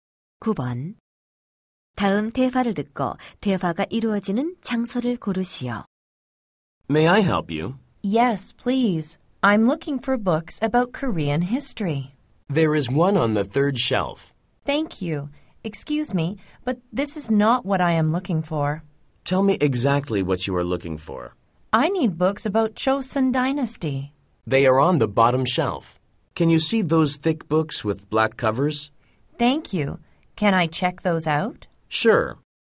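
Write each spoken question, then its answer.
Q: 다음 대화를 듣고 대화가 이루어지는 장소를 고르시오.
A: 도서관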